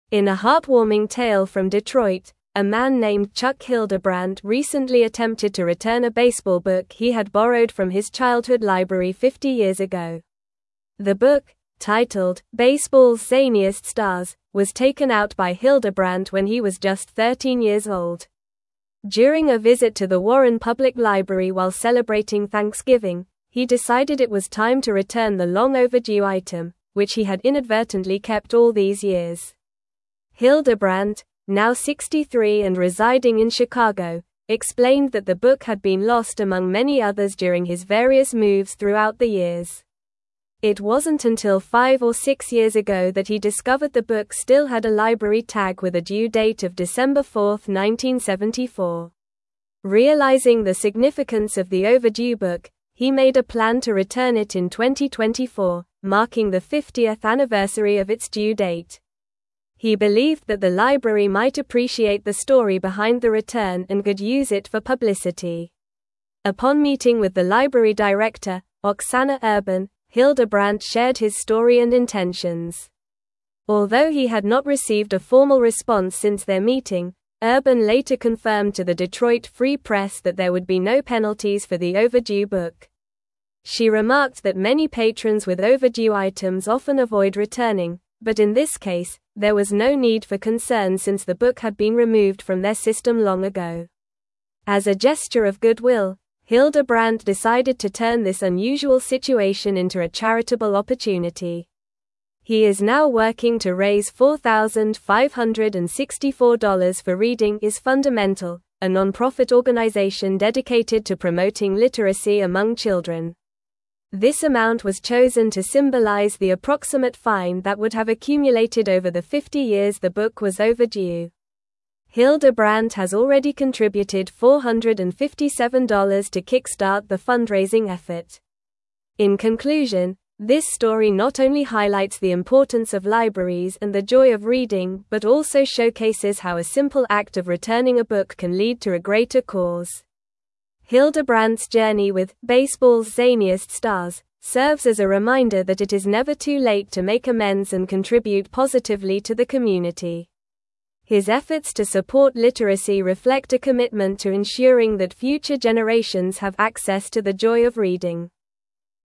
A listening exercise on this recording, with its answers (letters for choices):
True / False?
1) Hildebrandt plans to return the book in 2024 to mark the 50th anniversary of its due date.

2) He found out the book had a library sticker with a due date of December 4, 1984.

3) He has already contributed $457 to kickstart the fundraising effort.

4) The library director, Oksana Urban, confirmed there would be no penalties for the overdue book.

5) Hildebrandt was 14 years old when he borrowed the book.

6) Chuck Hildebrandt borrowed a baseball book from his childhood library fifty years ago.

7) The book he rented is called "Baseball's Craziest Celebrities."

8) What was the title of the book that Chuck Hildebrandt attempted to return?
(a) Baseball's Zaniest Stars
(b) Baseball for Beginners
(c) The History of Baseball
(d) Famous Baseball Players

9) How many years did Chuck Hildebrandt keep the book before returning it?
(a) 40 years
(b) 30 years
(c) 20 years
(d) 50 years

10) Where did Chuck Hildebrandt decide to return the overdue book?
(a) Chicago Public Library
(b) Warren Public Library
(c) Detroit Public Library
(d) New York Public Library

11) What was the due date printed on the library tag of the book?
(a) December 4, 1984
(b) December 4, 1964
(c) December 4, 1994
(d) December 4, 1974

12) What organization is Chuck Hildebrandt raising funds for?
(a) Books for Kids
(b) Literacy Volunteers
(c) Reading is Fundamental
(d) Save the Libraries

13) How much money is Chuck Hildebrandt aiming to raise for the charity?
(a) $5,000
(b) $3,000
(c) $4,564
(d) $2,500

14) What amount did Chuck Hildebrandt initially contribute to kickstart the fundraising effort?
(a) $457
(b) $500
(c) $400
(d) $600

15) Who is the library director that Chuck Hildebrandt met with regarding the book return?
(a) Sarah Johnson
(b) Oksana Urban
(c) Emily Davis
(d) Michael Smith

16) In a heartwarming tale from Detroit, a man named (1)______ Hildebrandt recently attempted to return a baseball book he had borrowed from his childhood library fifty years ago.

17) During a visit to the Warren Public Library while celebrating (2)______, he decided it was time to return the long-overdue item, which he had inadvertently kept all these years.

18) Hildebrandt, now 63 and residing in (3)______, (4)______ that the book had been lost among many others during his various moves throughout the years.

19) Hildebrandt, now 63 and residing in (3)______, (4)______ that the book had been lost among many others during his various moves throughout the years.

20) Realizing the significance of the overdue book, he made a plan to (5)______ it in 2024, (6)______ the 50th anniversary of its due date.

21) Realizing the significance of the overdue book, he made a plan to (5)______ it in 2024, (6)______ the 50th anniversary of its due date.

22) Upon meeting with the library director, Oksana (7)______, Hildebrandt shared his story and intentions.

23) Although he had not (8)______ a formal response since their meeting, Urban later confirmed to the Detroit Free Press that there would be no (9)______ for the overdue book.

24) Although he had not (8)______ a formal response since their meeting, Urban later confirmed to the Detroit Free Press that there would be no (9)______ for the overdue book.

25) As a gesture of goodwill, (10)______ decided to turn this unusual situation into a charitable (11)______.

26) As a gesture of goodwill, (10)______ decided to turn this unusual situation into a charitable (11)______.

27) This amount was (12)______ to symbolize the approximate fine that would have accumulated over the fifty years the book was overdue.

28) Hildebrandt has already contributed $457 to (13)______ the fundraising effort.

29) In conclusion, this story not only highlights the importance of libraries and the joy of reading but also showcases how a simple act of returning a book can lead to a (14)______ cause.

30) His (15)______ to (16)______ literacy reflect a commitment to ensuring that future generations have access to the joy of reading.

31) His (15)______ to (16)______ literacy reflect a commitment to ensuring that future generations have access to the joy of reading.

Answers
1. True
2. False
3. True
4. True
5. False
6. True
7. False
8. a
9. d
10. b
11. d
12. c
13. c
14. a
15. b
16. Chuck
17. Thanksgiving
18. Chicago
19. explained
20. return
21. marking
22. Urban
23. received
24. penalties
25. Hildebrandt
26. opportunity
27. chosen
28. kickstart
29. greater
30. efforts
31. support

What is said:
In a heartwarming tale from Detroit, a man named Chuck Hildebrandt recently attempted to return a baseball book he had borrowed from his childhood library fifty years ago. The book, titled "Baseball's Zaniest Stars," was taken out by Hildebrandt when he was just 13 years old. During a visit to the Warren Public Library while celebrating Thanksgiving, he decided it was time to return the long-overdue item, which he had inadvertently kept all these years.
Hildebrandt, now 63 and residing in Chicago, explained that the book had been lost among many others during his various moves throughout the years. It wasn't until five or six years ago that he discovered the book still had a library tag with a due date of December 4, 1974. Realizing the significance of the overdue book, he made a plan to return it in 2024, marking the 50th anniversary of its due date. He believed that the library might appreciate the story behind the return and could use it for publicity.
Upon meeting with the library director, Oksana Urban, Hildebrandt shared his story and intentions. Although he had not received a formal response since their meeting, Urban later confirmed to the Detroit Free Press that there would be no penalties for the overdue book. She remarked that many patrons with overdue items often avoid returning, but in this case, there was no need for concern since the book had been removed from their system long ago.
As a gesture of goodwill, Hildebrandt decided to turn this unusual situation into a charitable opportunity. He is now working to raise $4,564 for Reading is Fundamental, a nonprofit organization dedicated to promoting literacy among children. This amount was chosen to symbolize the approximate fine that would have accumulated over the fifty years the book was overdue. Hildebrandt has already contributed $457 to kickstart the fundraising effort.
In conclusion, this story not only highlights the importance of libraries and the joy of reading but also showcases how a simple act of returning a book can lead to a greater cause. Hildebrandt's journey with "Baseball's Zaniest Stars" serves as a reminder that it is never too late to make amends and contribute positively to the community. His efforts to support literacy reflect a commitment to ensuring that future generations have access to the joy of reading.

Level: Level 4